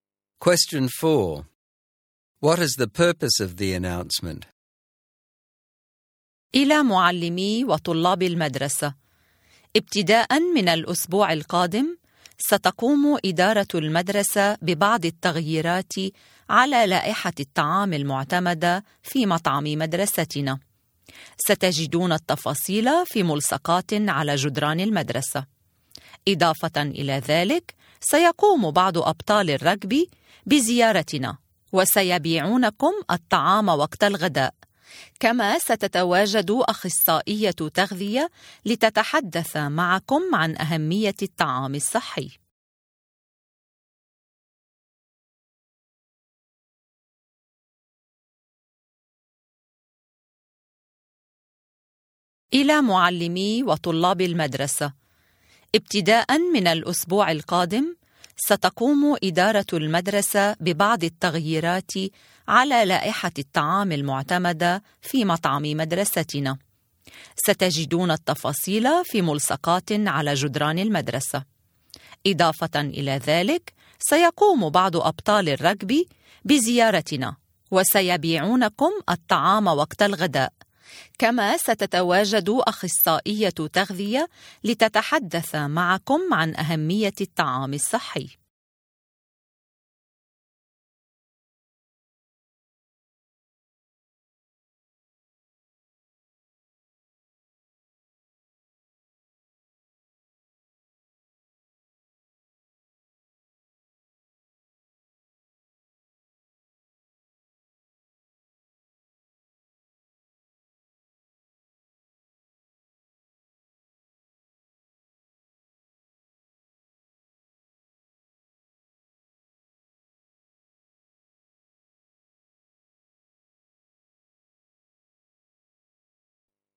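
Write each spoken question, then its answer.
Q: What is the purpose of the announcement?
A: To tell students and teachers about changes to the school canteen menu and the healthy-eating activities that go with them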